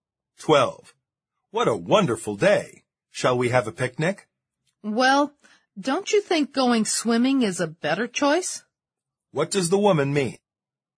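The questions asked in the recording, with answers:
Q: What does the woman mean?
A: She would prefer to go swimming instead of having a picnic.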